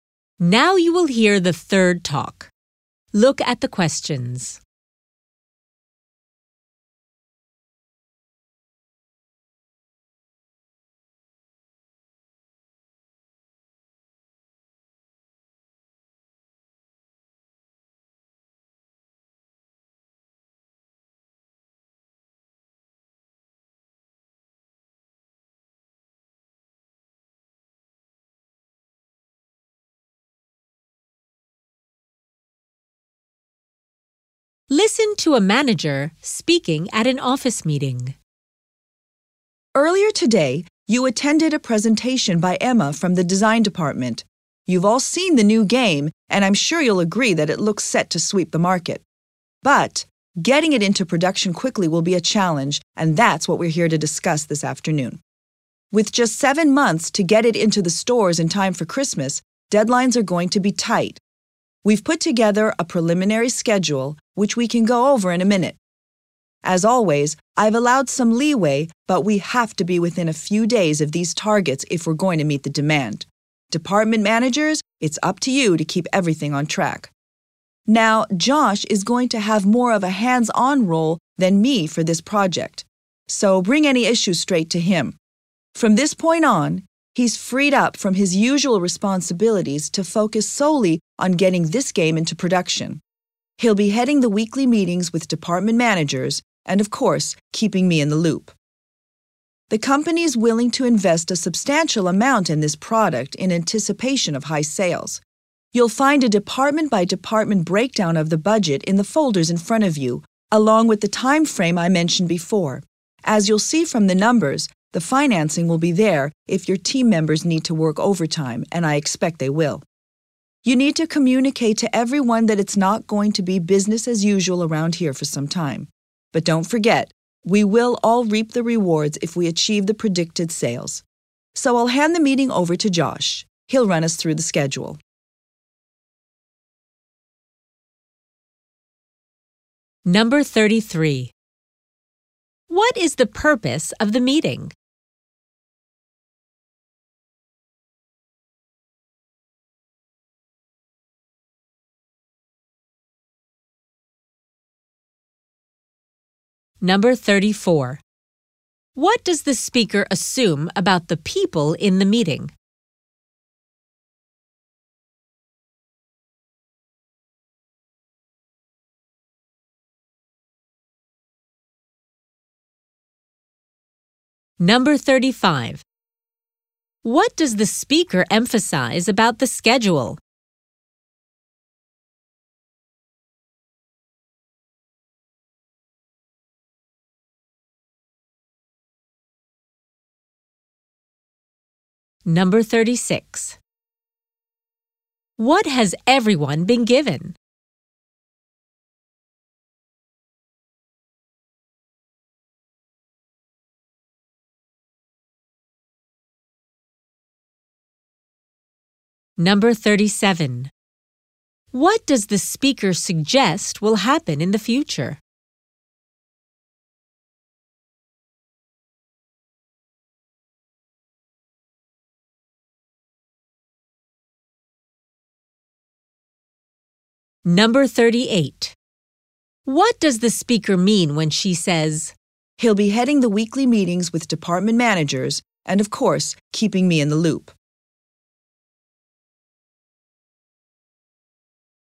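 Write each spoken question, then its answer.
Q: What is the purpose of the meeting?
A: To discuss getting the new game into production quickly

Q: What does the speaker emphasize about the schedule?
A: The deadlines are tight and must be met

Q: What has everyone been given?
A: Folders with the budget breakdown and schedule

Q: What does the speaker mean when she says, "He'll be heading the weekly meetings with department managers and, of course, keeping me in the loop"?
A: Josh will keep her informed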